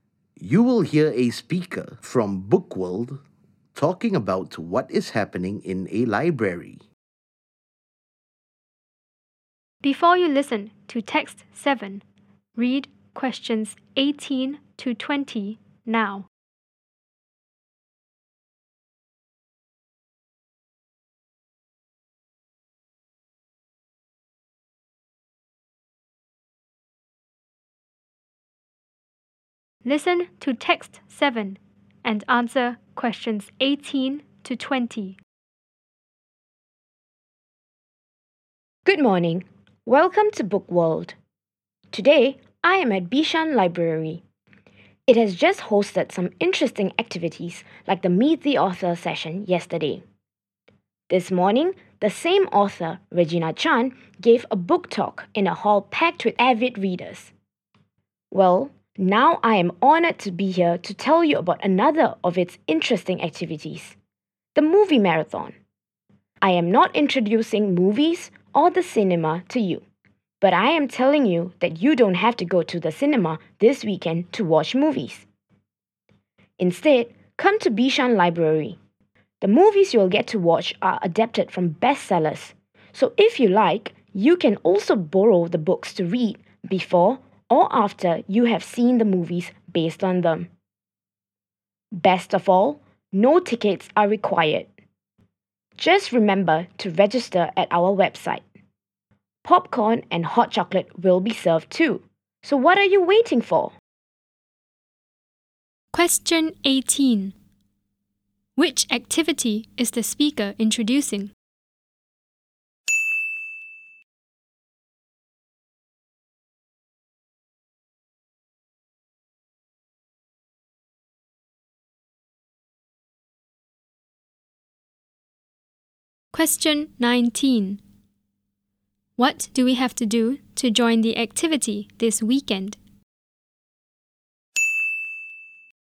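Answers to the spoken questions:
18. The movie marathon
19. Register at the library's website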